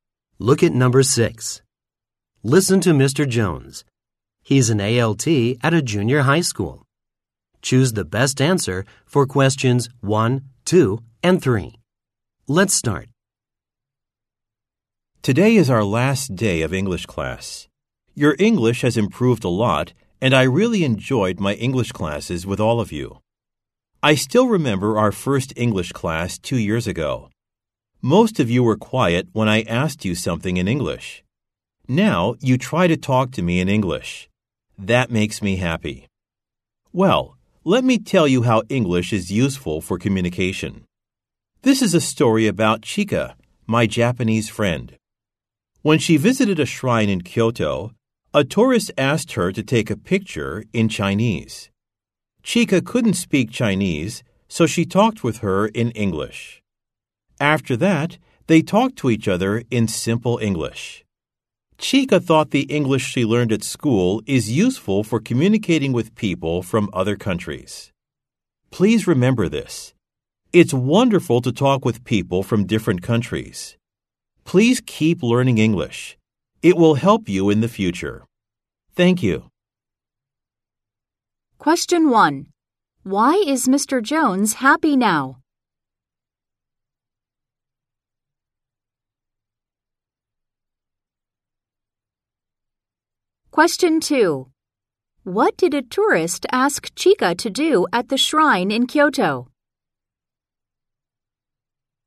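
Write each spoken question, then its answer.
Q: Why is Mr. Jones happy now?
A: Because the students now try to talk to him in English

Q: What did a tourist ask Chika to do at the shrine in Kyoto?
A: To take a picture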